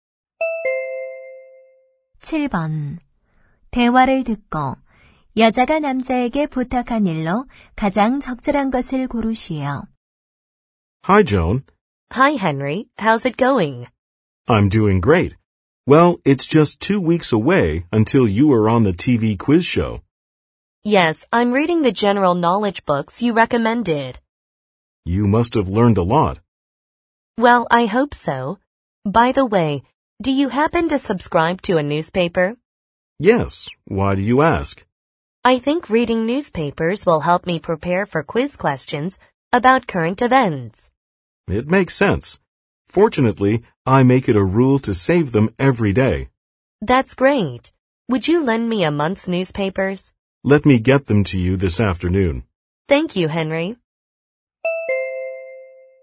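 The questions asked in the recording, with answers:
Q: 대화를 듣고 여자가 남자에게 부탁한 일로 가장 적절한 것을 고르시오.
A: 한 달 치 신문 빌려주기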